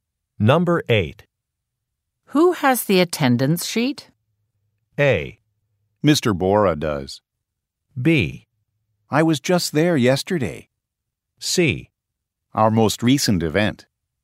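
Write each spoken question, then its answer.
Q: Who has the attendance sheet?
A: A: Mr. Bora does.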